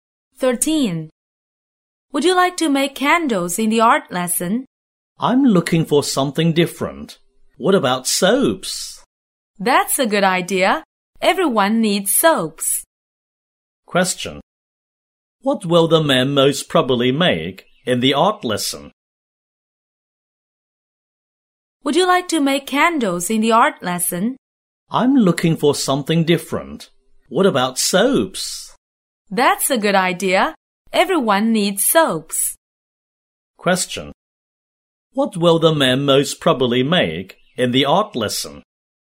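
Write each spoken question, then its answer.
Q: What will the men most probably make in the art lesson?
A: Soaps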